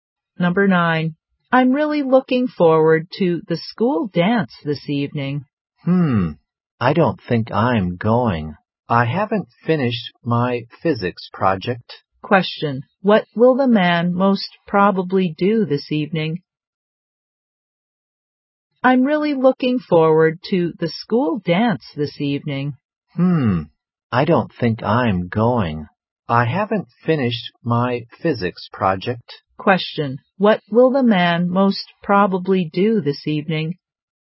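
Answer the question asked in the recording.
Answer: Work on his physics project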